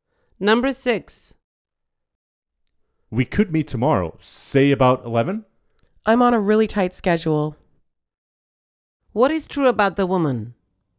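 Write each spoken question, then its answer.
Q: What is true about the woman?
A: She is very busy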